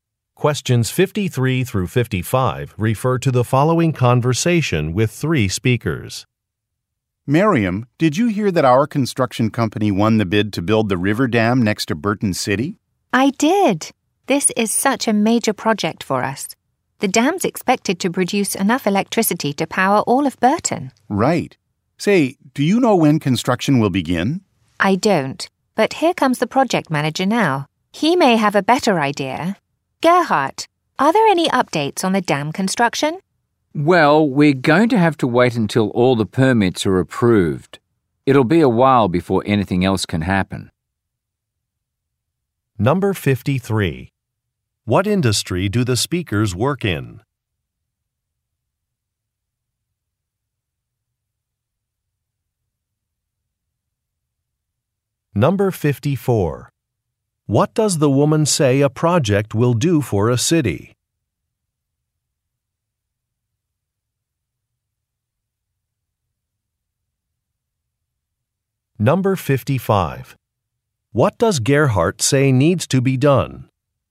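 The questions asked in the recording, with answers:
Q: What industry do the speakers work in?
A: Construction

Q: What does the woman say a project will do for a city?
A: Provide enough electricity to power it

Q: What does Gerhardt say needs to be done?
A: Permits need to be approved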